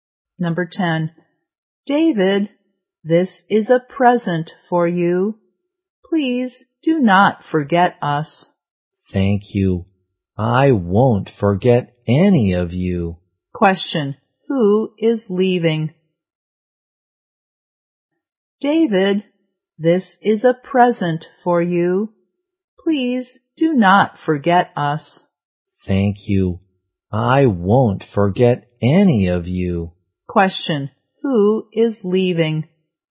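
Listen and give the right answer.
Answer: David.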